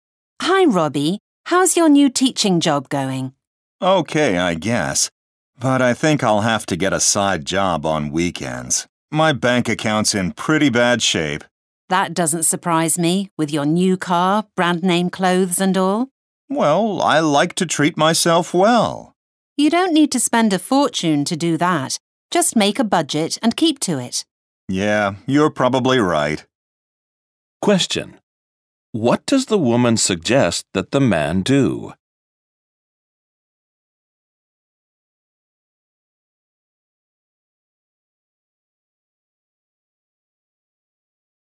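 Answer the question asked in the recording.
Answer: Make a budget and keep to it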